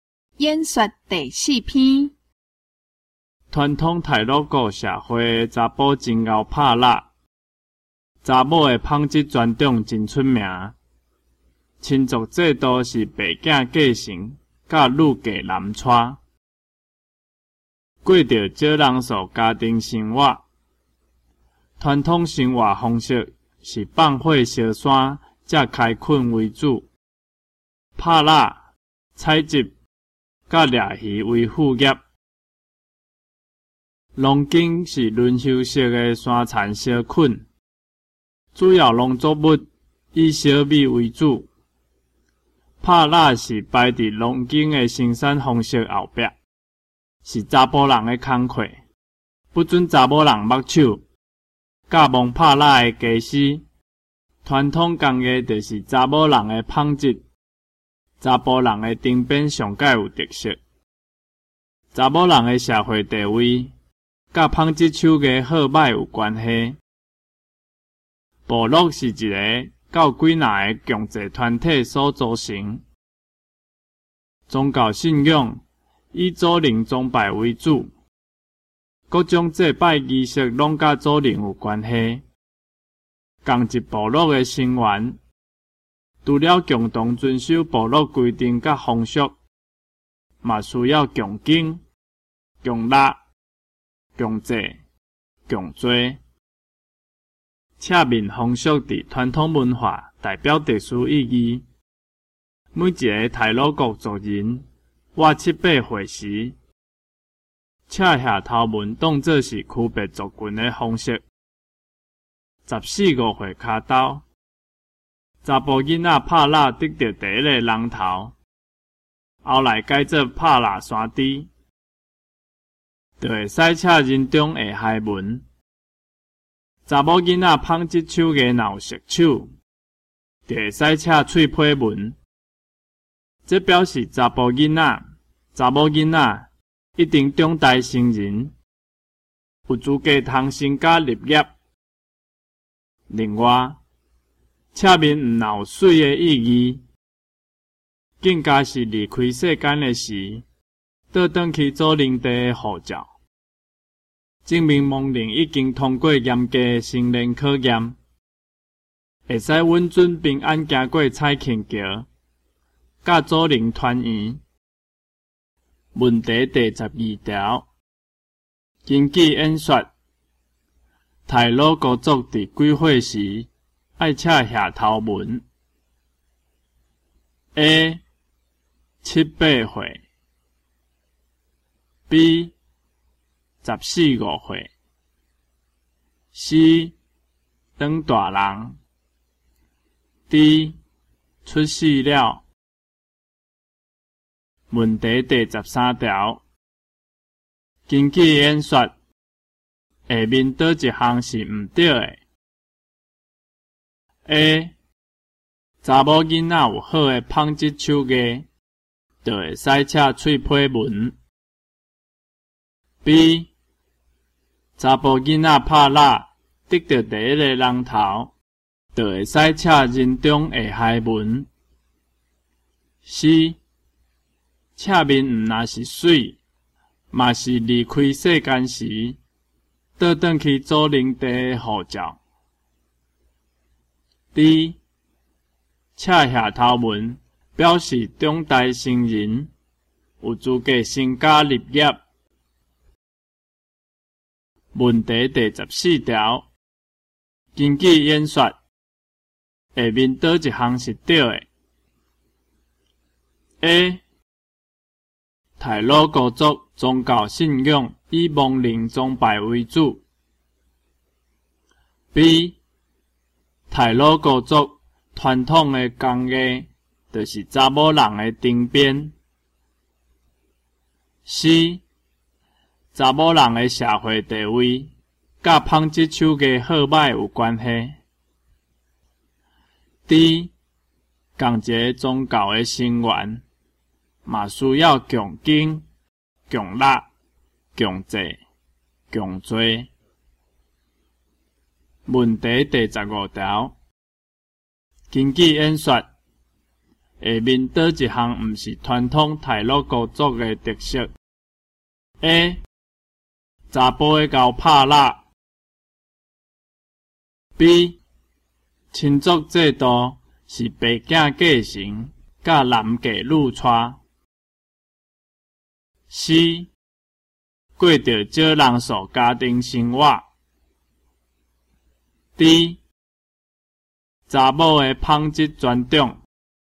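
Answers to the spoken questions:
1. A: 七八岁
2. D: 赤下头纹表示中代成人,有资格成家立业
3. C: 查某人的社会地位,甲纺织手艺好歹有关系
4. B: 亲族制度是白嫁继承,甲男嫁女娶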